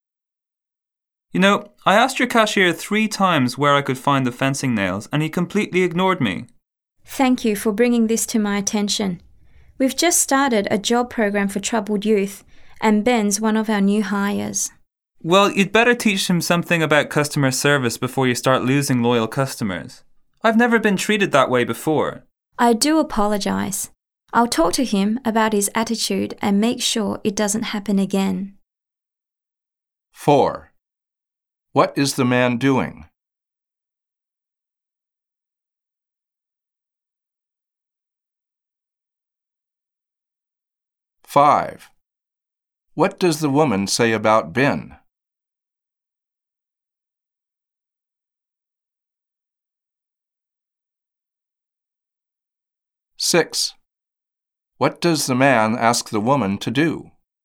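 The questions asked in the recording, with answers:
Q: What is the man doing?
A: Complaining about a cashier who ignored him

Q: What does the woman say about Ben?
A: He is a new hire from a job program for troubled youth

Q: What does the man ask the woman to do?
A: Teach Ben about customer service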